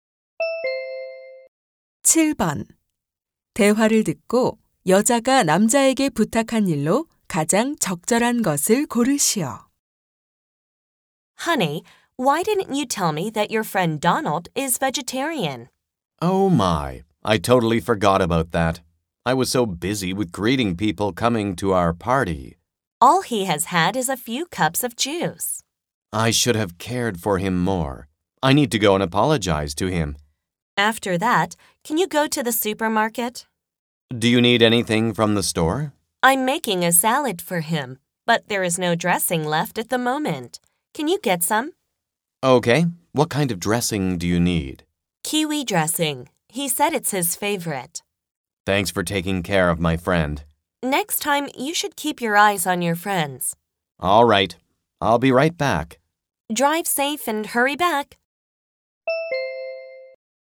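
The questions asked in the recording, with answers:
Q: 대화를 듣고 여자가 남자에게 부탁한 일로 가장 적절한 것을 고르시오.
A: 슈퍼마켓에서 키위 드레싱 사 오기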